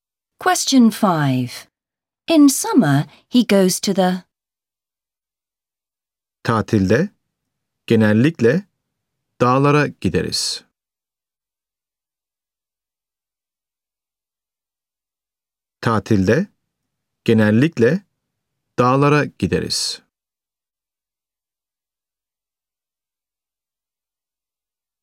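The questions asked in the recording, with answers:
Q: In summer, he goes to the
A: mountains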